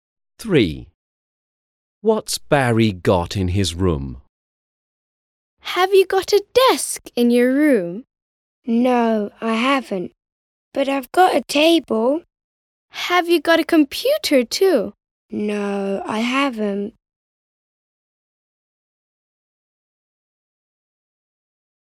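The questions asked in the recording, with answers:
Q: What's Barry got in his room?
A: A table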